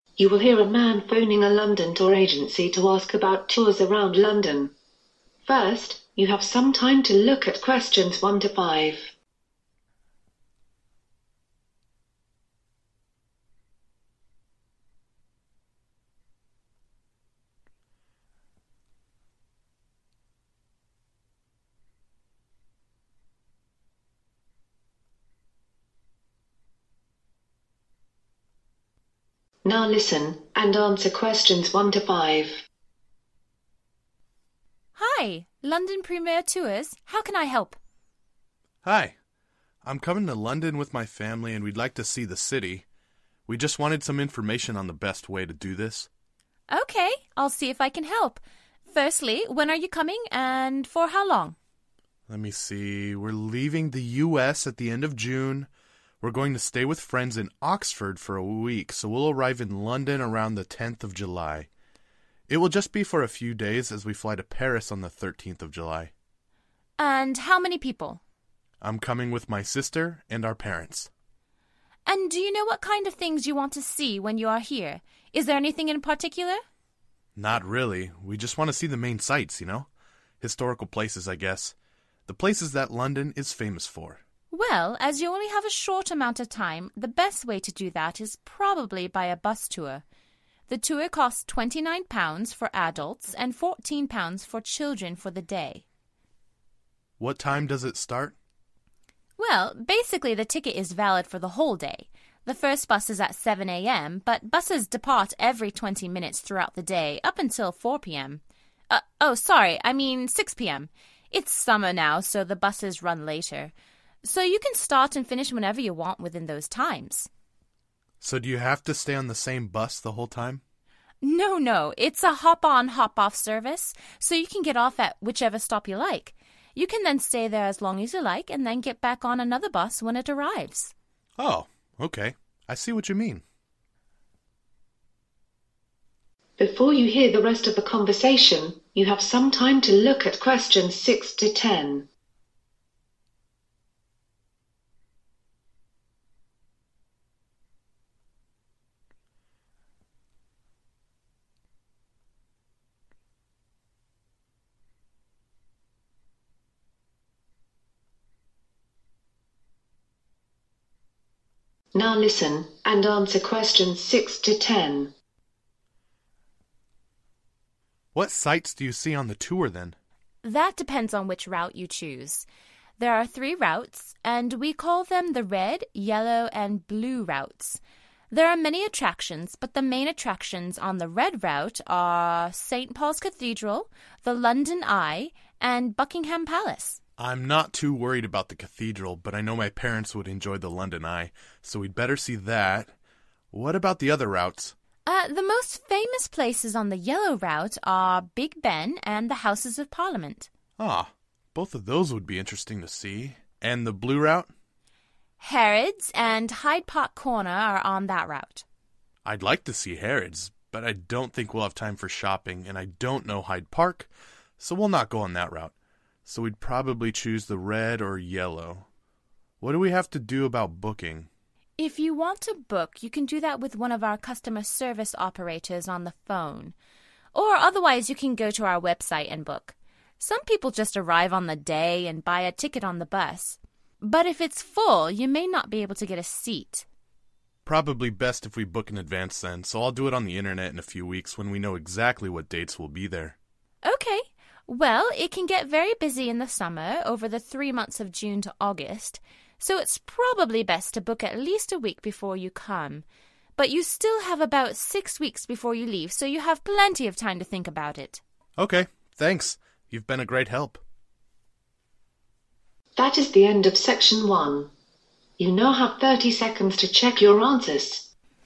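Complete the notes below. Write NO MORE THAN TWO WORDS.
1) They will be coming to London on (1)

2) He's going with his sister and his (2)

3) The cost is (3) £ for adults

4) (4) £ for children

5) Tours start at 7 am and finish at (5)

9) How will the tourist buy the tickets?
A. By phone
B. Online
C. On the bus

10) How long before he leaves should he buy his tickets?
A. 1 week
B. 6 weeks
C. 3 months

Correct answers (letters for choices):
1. 10th July
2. parents
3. 29
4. 14
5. 6 pm
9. B
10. A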